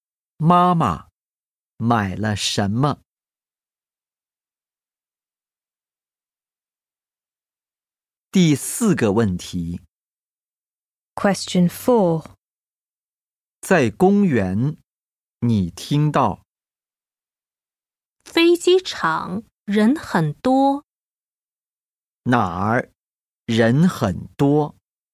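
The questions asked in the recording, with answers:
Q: 哪儿人很多?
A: 飞机场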